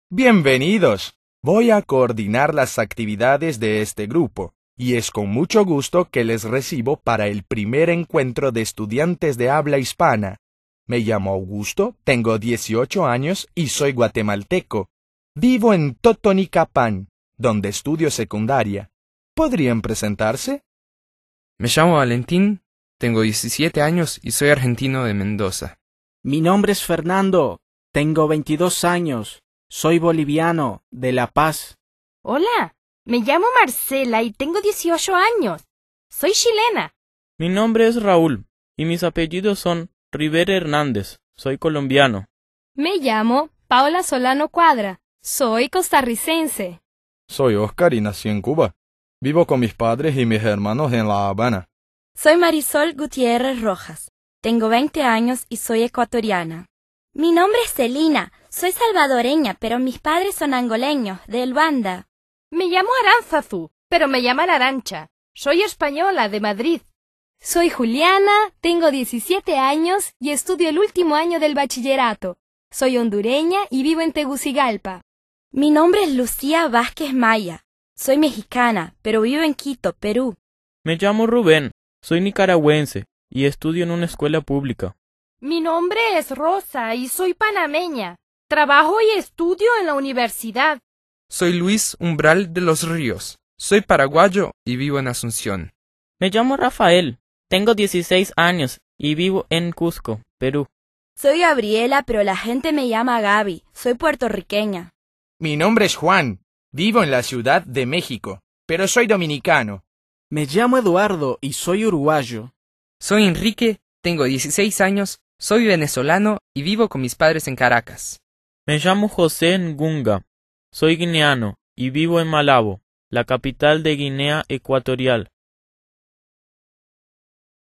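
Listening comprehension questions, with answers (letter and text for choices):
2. Según lo que has escuchado en el audio, ¿cuáles son las formas posibles de decir el nombre en español?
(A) Mi nombre es.... Me llamo.... Soy....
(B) El mío nombre es... Me llamo.... Soy....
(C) Mi nombre es... Llamo... Soy...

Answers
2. (A) Mi nombre es.... Me llamo.... Soy....

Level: A1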